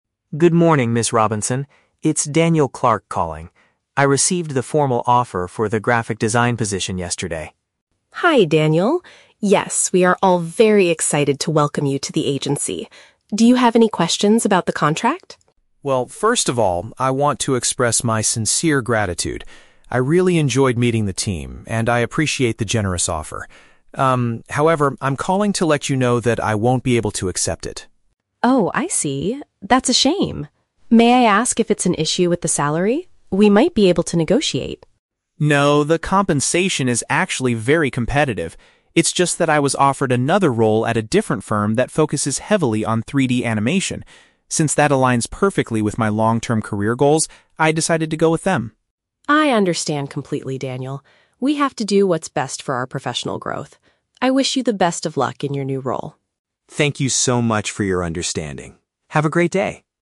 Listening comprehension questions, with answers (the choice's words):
Listen to the telephone conversation between a job applicant and a recruiter. Choose the correct answer (A, B, or C) for each question.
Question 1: What is Daniel's main purpose for calling Ms. Robinson?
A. To accept the graphic design job and ask a question about the contract.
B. To politely refuse the employment opportunity he was given.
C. To negotiate a higher starting salary for his new position.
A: To politely refuse the employment opportunity he was given.

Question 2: What does the recruiter offer to do when she hears Daniel's decision?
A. Discuss increasing the amount of money they will pay him.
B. Introduce him to another company that does 3D animation.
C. Give him a few more days to think about his professional growth.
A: Discuss increasing the amount of money they will pay him.

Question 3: Why did Daniel choose the other company?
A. Because they offered him a much more competitive salary.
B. Because he did not enjoy meeting the team at Ms. Robinson's agency.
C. Because the work matches his future professional ambitions better.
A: Because the work matches his future professional ambitions better.

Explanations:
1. Daniel says he is calling to let her know that "I won't be able to accept it" (the job offer). Option (B) correctly paraphrases this as refusing the employment opportunity. Option (A) is The Trap: The words "graphic design" and "contract" are mentioned by Ms. Robinson, but Daniel is not accepting the job. Option (C) is The Trap: Ms. Robinson offers to negotiate the salary, but Daniel explicitly says "No".
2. Ms. Robinson asks if there is an issue with the salary and says, "We might be able to negotiate." Option (A) accurately paraphrases this (negotiate salary = discuss increasing the amount of money). Option (B) is The Trap: "3D animation" is the focus of the

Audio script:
Robinson. It's Daniel Clark calling. I received the formal offer for the graphic design position yesterday.
Robinson: Hi Daniel! Yes, we are all very excited to welcome you to the agency. Do you have any questions about the contract?
Daniel: Well, first of all, I want to express my sincere gratitude. I really enjoyed meeting the team, and I appreciate the generous offer. Um, however, I'm calling to let you know that I won't be able to accept it.
Robinson: Oh, I see. That's a shame. May I ask if it's an issue with the salary? We might be able to negotiate.
Daniel: No, the compensation is actually very competitive. It's just that I was offered another role at a different firm that focuses heavily on 3D animation. Since that aligns perfectly with my long-term career goals, I decided to go with them.
Robinson: I understand completely, Daniel. We have to do what's best for our professional growth. I wish you the best of luck in your new role.